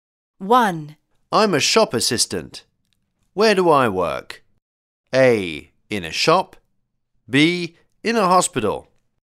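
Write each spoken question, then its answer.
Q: I'm a shop assistant. Where do I work?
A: A: In a shop.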